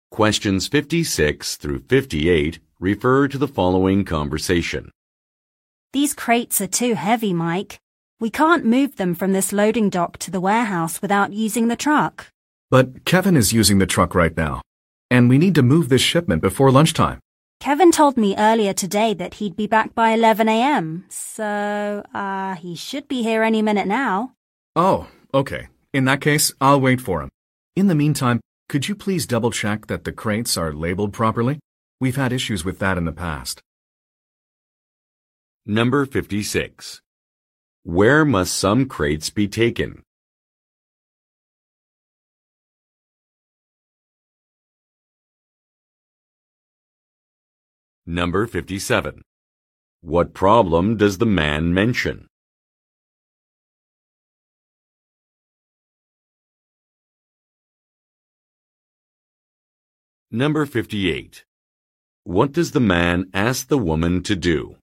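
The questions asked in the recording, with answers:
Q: Where must some crates be taken?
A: To the warehouse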